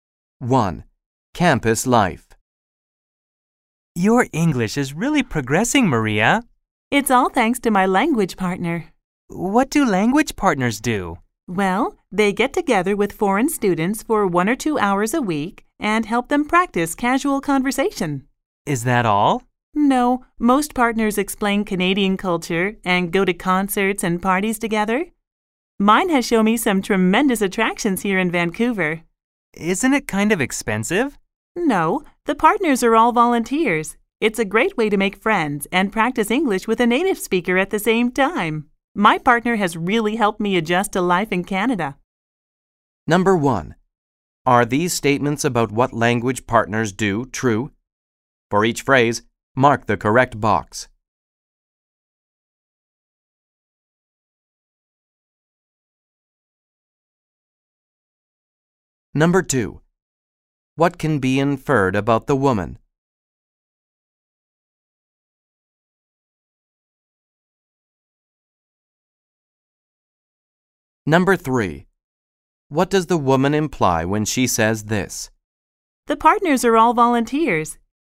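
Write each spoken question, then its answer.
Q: What does the woman imply when she says this?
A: Having a language partner costs nothing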